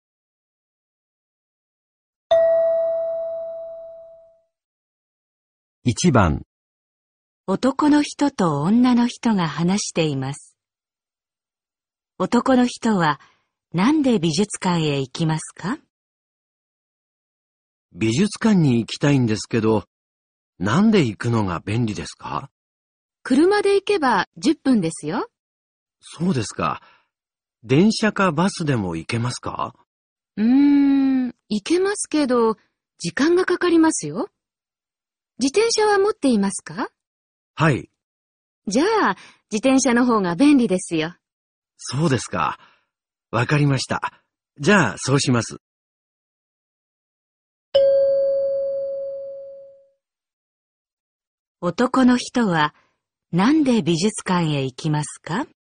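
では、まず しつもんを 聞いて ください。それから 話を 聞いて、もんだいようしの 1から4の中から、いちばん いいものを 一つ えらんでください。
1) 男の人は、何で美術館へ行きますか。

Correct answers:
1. 自転車

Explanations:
男の人と女の人が話しています。男の人は、何で美術館へ行きますか。 男:美術館に行きたいんですけど、何で行くのが便利ですか。 女:車で行けば10分ですよ。 男:そうですか。電車かバスでも行けますか。 女:ううん、行けますけど、時間がかかりますよ。自転車は持っていますか。 男:はい。 女:じゃあ、自転車のほうが便利ですよ。 男:そうですか。分かりました。じゃ、そうします。 男の人は、何で美術館へ行きますか。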